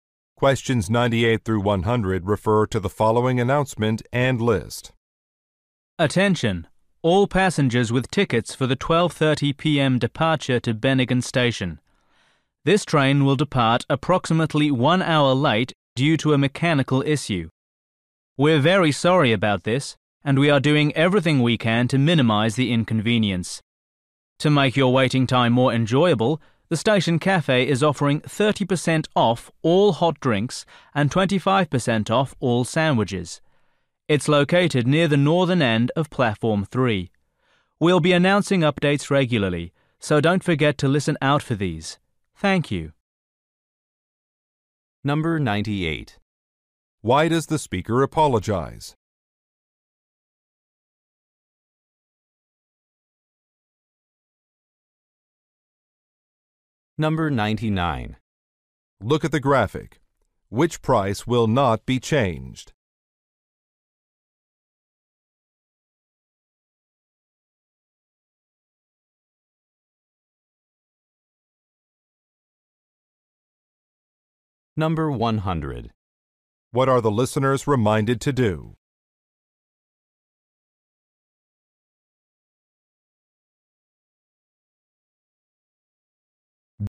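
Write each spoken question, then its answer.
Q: Why does the speaker apologize?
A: The train is delayed

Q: What are the listeners reminded to do?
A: Listen for updates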